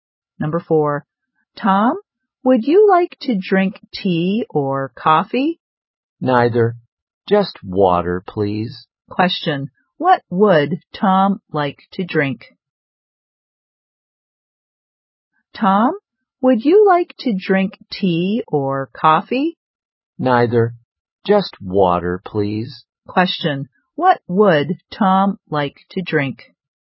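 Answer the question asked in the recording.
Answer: Water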